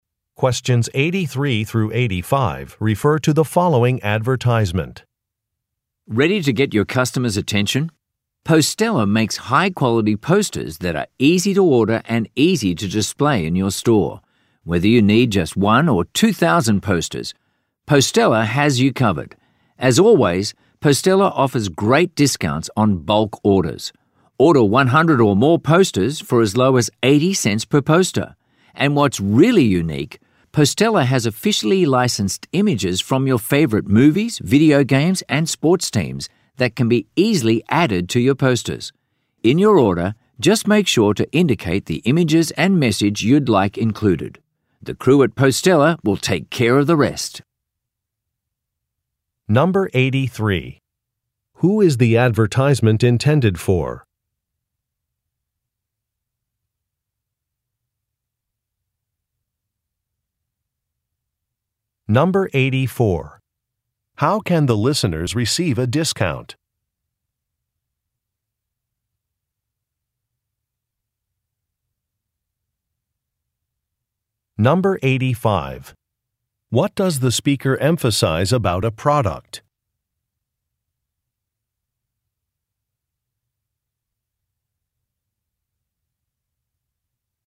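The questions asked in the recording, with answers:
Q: How can the listeners receive a discount?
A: By ordering 100 or more posters in bulk

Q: What does the speaker emphasize about a product?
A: Officially licensed images from movies, video games, and sports teams can be added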